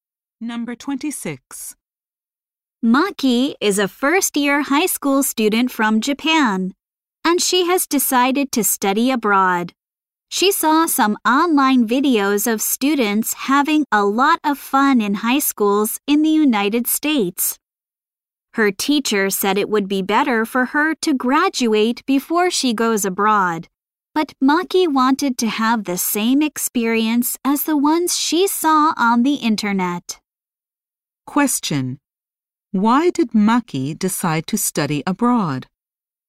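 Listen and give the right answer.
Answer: She wanted the fun high school experience she saw in online videos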